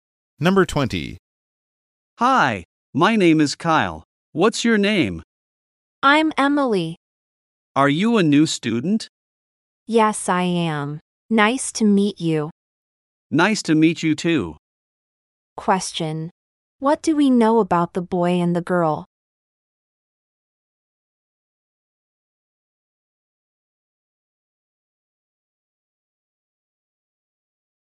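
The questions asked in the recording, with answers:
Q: What do we know about the boy and the girl?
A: They are meeting for the first time; Emily is a new student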